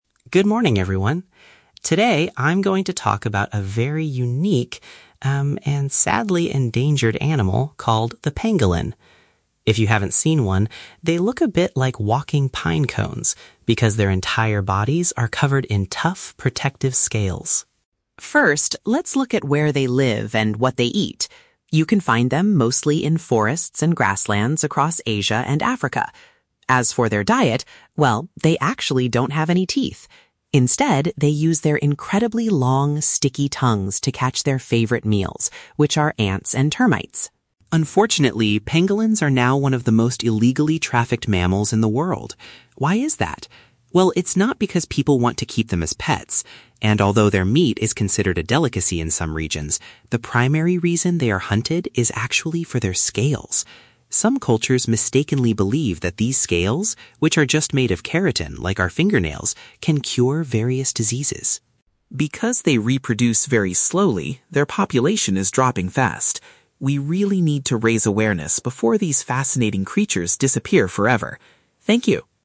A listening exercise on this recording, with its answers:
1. What do pangolins primarily consume for food?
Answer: Small insects using their sticky tongues.

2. According to the speaker, what is the main reason pangolins are illegally hunted?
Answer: Their scales are believed to be able to treat illnesses.

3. What biological factor makes it difficult for the pangolin population to recover?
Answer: They have a very low birth rate.

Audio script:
Student: Good morning, everyone. Today, I'm going to talk about a very unique, um, and sadly endangered animal called the pangolin. If you haven't seen one, they look a bit like walking pinecones because their entire bodies are covered in tough, protective scales.
First, let's look at where they live and what they eat. You can find them mostly in forests and grasslands across Asia and Africa. As for their diet, well, they actually don't have any teeth. Instead, they use their incredibly long, sticky tongues to catch their favorite meals, which are ants and termites.
Unfortunately, pangolins are now one of the most illegally trafficked mammals in the world. Why is that? Well, it's not because people want to keep them as pets. And although their meat is considered a delicacy in some regions, the primary reason they are hunted is actually for their scales. Some cultures mistakenly believe that these scales—which are just made of keratin, like our fingernails—can cure various diseases.
Because they reproduce very slowly, their population is dropping fast. We really need to raise awareness before these fascinating creatures disappear forever. Thank you.